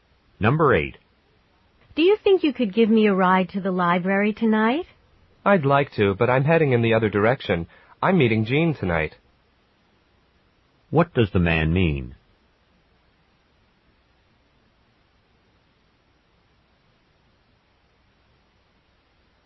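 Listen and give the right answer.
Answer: He can't give her a ride because he's going the other way.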